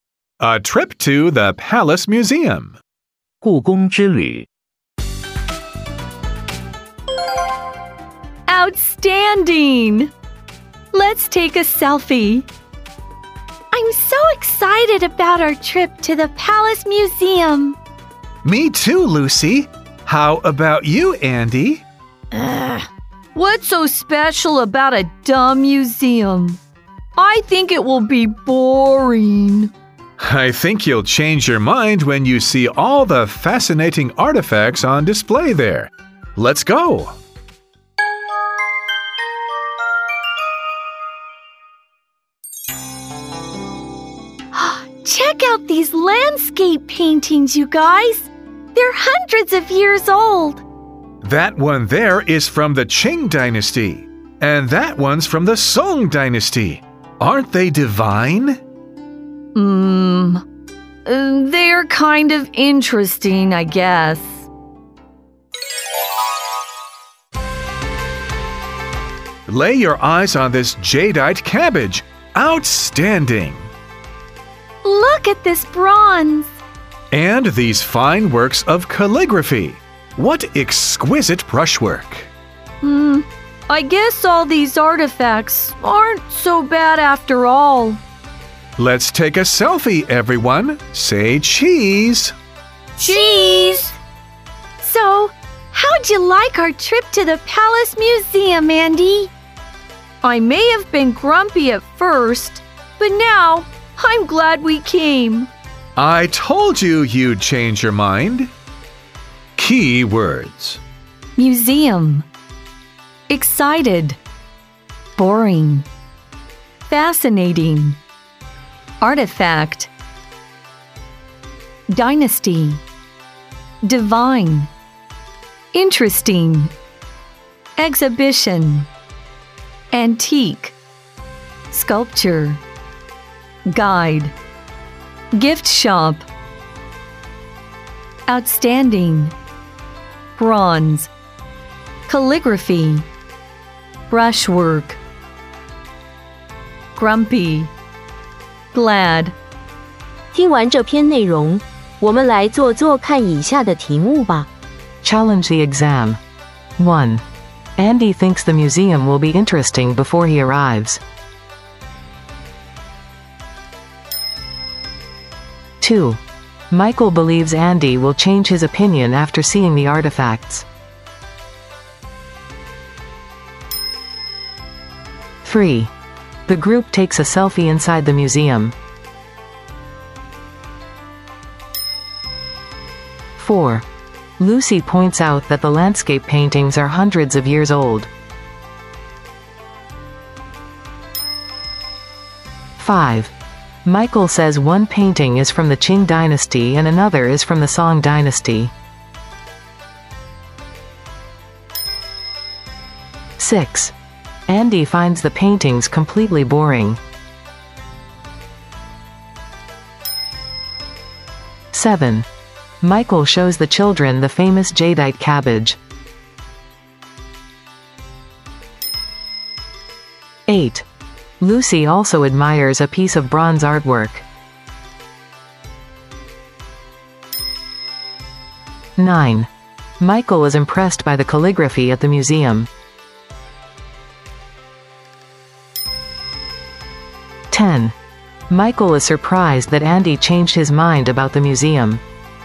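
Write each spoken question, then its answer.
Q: Andy thinks the museum will be interesting before he arrives.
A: False

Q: Michael believes Andy will change his opinion after seeing the artifacts.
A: True

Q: The group takes a selfie inside the museum.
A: True

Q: Andy finds the paintings completely boring.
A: False

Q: Michael is surprised that Andy changed his mind about the museum.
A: False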